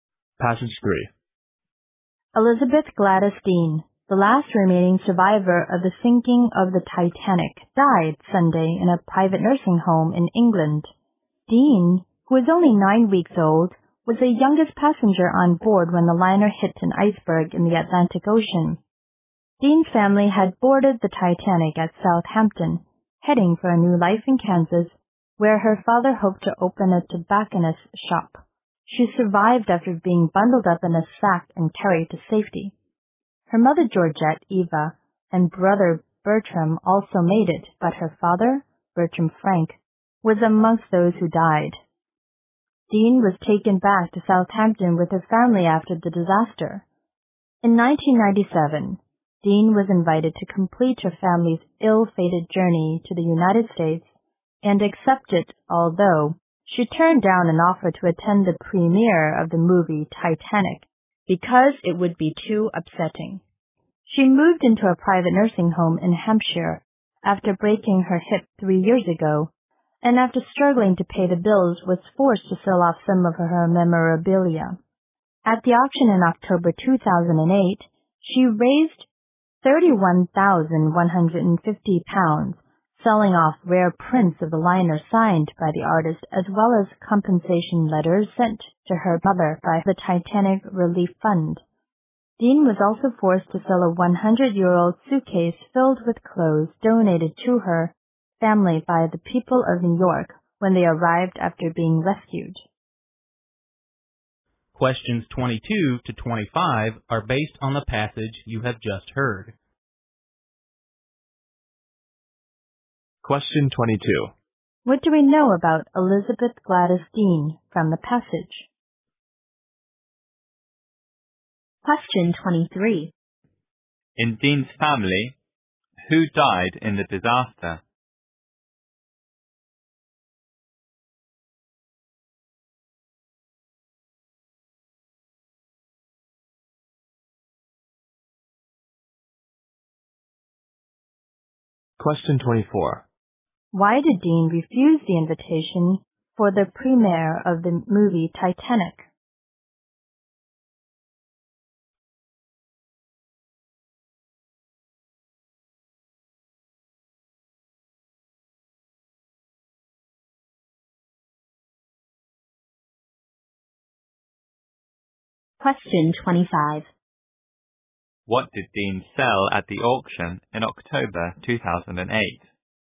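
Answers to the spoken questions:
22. She was the last survivor and youngest passenger of the Titanic.
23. Her father.
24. It would be too upsetting.
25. Signed prints of the liner and compensation letters sent to her mother.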